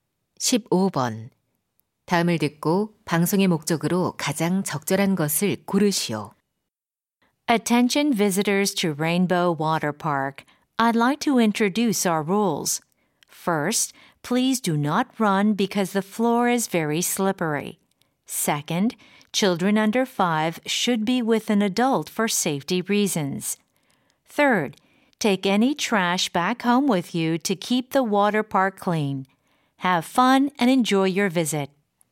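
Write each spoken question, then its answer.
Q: 다음을 듣고 방송의 목적으로 가장 적절한 것을 고르시오.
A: 워터파크 이용 규칙 안내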